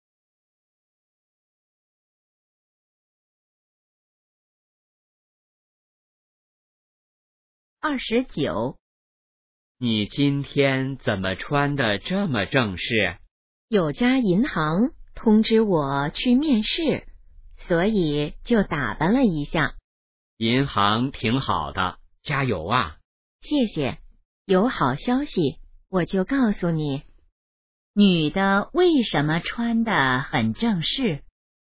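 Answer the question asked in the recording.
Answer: 去银行面试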